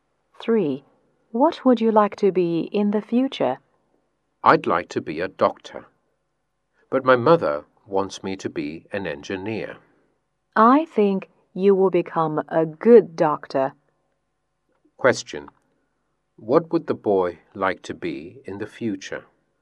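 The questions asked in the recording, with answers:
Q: What would the boy like to be in the future?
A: A doctor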